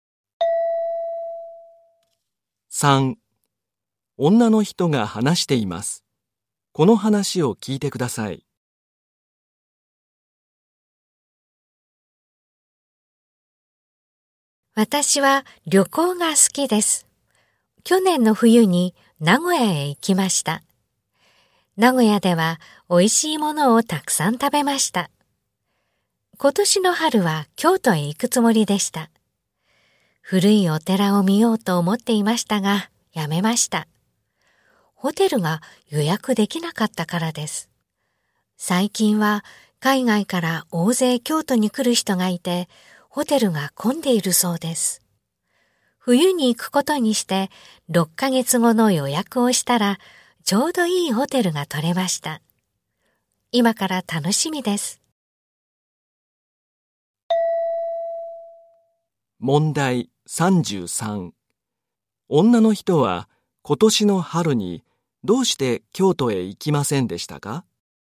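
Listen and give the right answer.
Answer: ホテルが予約できなかったから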